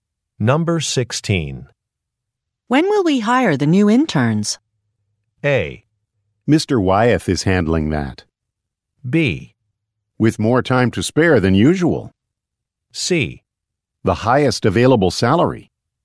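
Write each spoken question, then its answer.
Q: When will we hire the new interns?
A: A: Mr. Wyeth is handling that.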